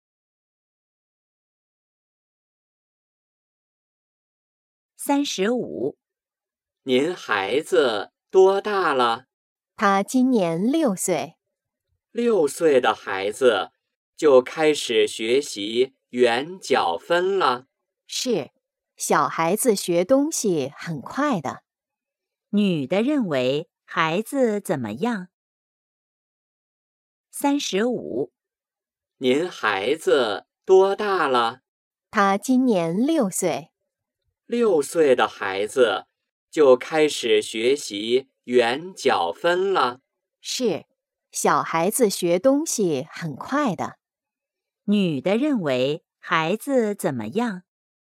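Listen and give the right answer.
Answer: 学东西很快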